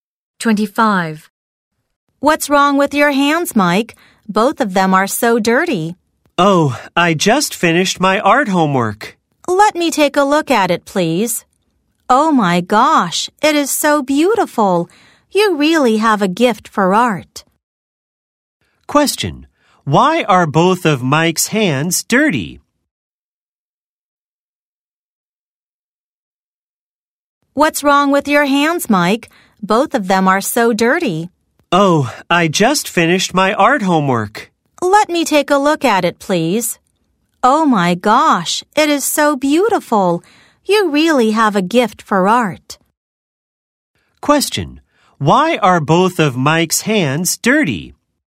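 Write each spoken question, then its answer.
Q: Why are both of Mike's hands dirty?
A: He just finished his art homework.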